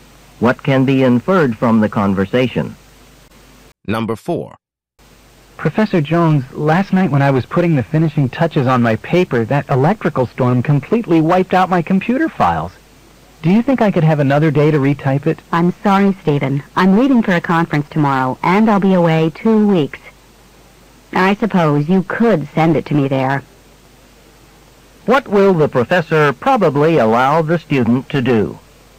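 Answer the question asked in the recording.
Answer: Send the paper to her at the conference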